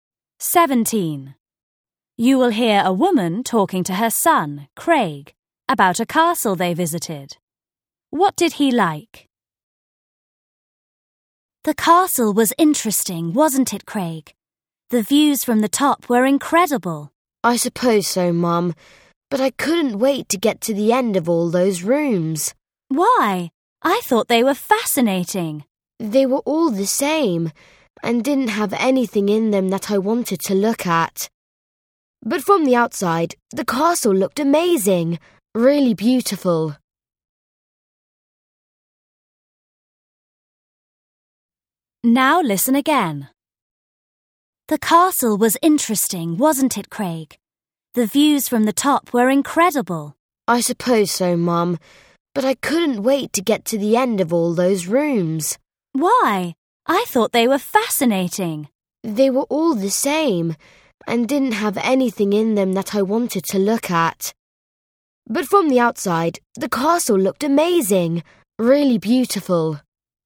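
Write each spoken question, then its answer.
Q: What did he like?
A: The outside of the castle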